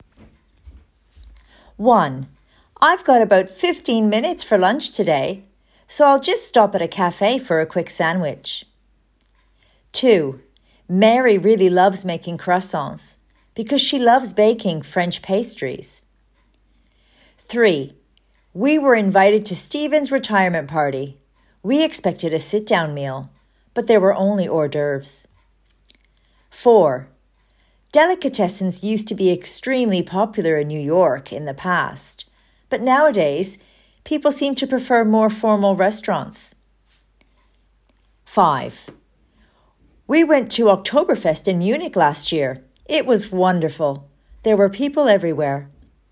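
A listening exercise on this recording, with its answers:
Listen to the audio and fill in the blanks with some of the loan words seen in the chart.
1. I've got about 15 minutes for lunch today, so I'll just stop at a café for a quick .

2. Mary really loves making because she loves baking French pastries.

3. We were invited to Steven's retirement party. We expected a sit down meal, but there were only .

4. used to be extremely popular in New York in the past, but nowadays people seem to prefer more formal restaurants.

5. We went to in Munich last year, it was wonderful. There were people everywhere.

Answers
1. sandwich
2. croissants
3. hors d'oeuvres
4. Delicatessens
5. Oktoberfest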